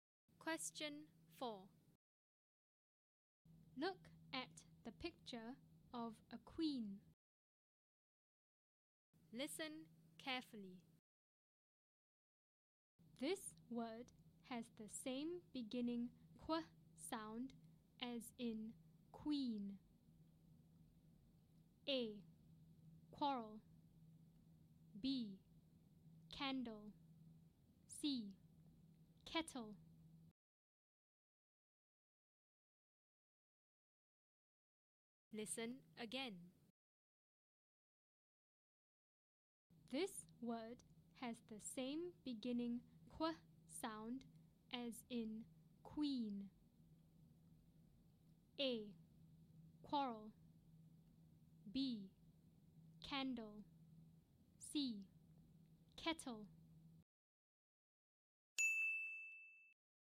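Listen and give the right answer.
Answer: A: Quarrel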